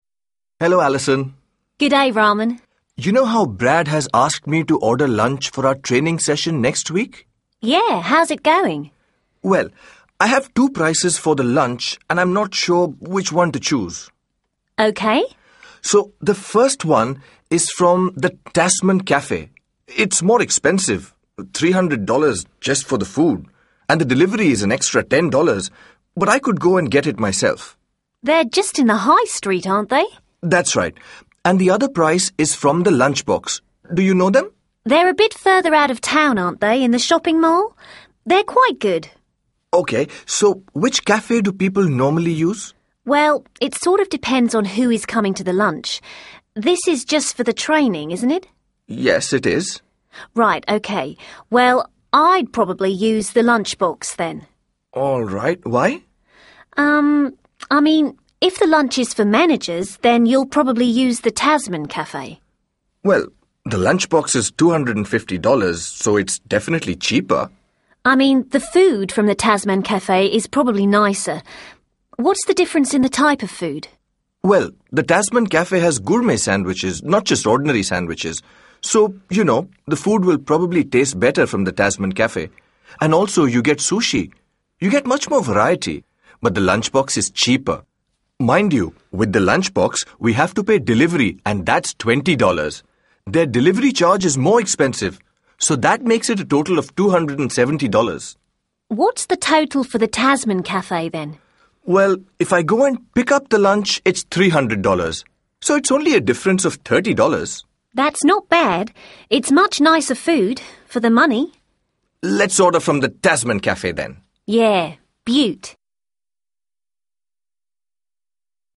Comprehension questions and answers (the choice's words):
2. Listen again and complete the information in the table.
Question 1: gourmet sandwiches ________.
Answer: sushi

1. Raman talks to Alison, the receptionist at the Vulcan Power Company, about the training session. Listen to their conversation. What does Raman do? Choose a, b or c.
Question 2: What does Raman do?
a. give instructions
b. explain a decision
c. ask for help making a choice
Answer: ask for help making a choice